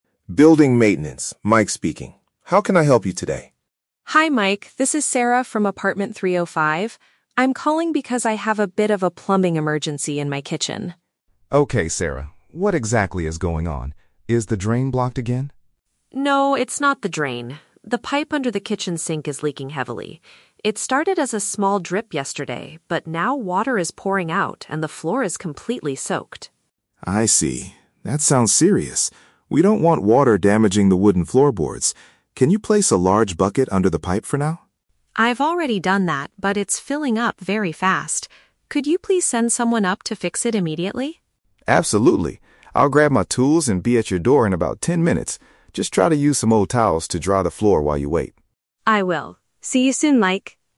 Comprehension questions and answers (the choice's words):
Listen to a telephone conversation between a tenant and a maintenance worker. Choose the correct answer (A, B, or C) for each question.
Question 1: What is the exact problem in Sarah's apartment?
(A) The kitchen sink is completely clogged.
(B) Water is escaping from a broken pipe.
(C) The wooden floor in her bedroom is damaged.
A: Water is escaping from a broken pipe.

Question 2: How does Sarah describe the current situation?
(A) The kitchen floor is extremely wet.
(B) A small bucket is slowly filling with water.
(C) The main water supply has been turned off.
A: The kitchen floor is extremely wet.

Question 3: What does Mike instruct Sarah to do before he arrives?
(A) Move her heavy furniture out of the kitchen.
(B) Go down to the maintenance office to sign a form.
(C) Use cloths to remove water from the ground.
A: Use cloths to remove water from the ground.

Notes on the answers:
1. Sarah states that "the pipe under the kitchen sink is leaking heavily". Option B uses synonyms to express this (escaping water = leaking heavily). Option A is the Trap: Mike asks if the drain is "blocked" (clogged), but Sarah explicitly says "No, it's not the drain." Option C is also a Trap: Mike mentions he doesn't want water damaging the "wooden floorboards", but this is in the kitchen, not the bedroom, and the floor isn't necessarily permanently damaged yet.
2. Sarah says "water is pouring out and the floor is completely soaked". Option A paraphrases this perfectly (completely soaked = extremely wet). Option B is the Trap: Sarah mentions a bucket, but she says "it's filling up very fast", not slowly. Option C is a logical step in a plumbing emergency, but it is not mentioned in the audio.
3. Mike tells Sarah to "use some old towels to dry the floor". Option C uses synonyms to describe this action (cloths = old towels; remove water from the ground = dry the floor). Options A and B are not mentioned in the conversation.

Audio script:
Mike: Building maintenance, Mike speaking. How can I help you today?
Sarah: Hi Mike, this is Sarah from apartment 305. I'm calling because I have a bit of a plumbing emergency in my kitchen.
Mike: Okay, Sarah. What exactly is going on? Is the drain blocked again?
Sarah: No, it's not the drain. The pipe under the kitchen sink is leaking heavily. It started as a small drip yesterday, but now water is pouring out and the floor is completely soaked.
Mike: I see. That sounds serious. We don't want water damaging the wooden floorboards. Can you place a large bucket under the pipe for now?
Sarah: I've already done that, but it's filling up very fast. Could you please send someone up to fix it immediately?
Mike: Absolutely. I'll grab my tools and be at your door in about ten minutes.